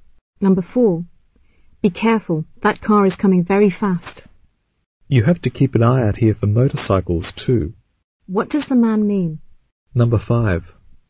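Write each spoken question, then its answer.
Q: What does the man mean?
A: Watch out for motorcycles as well as cars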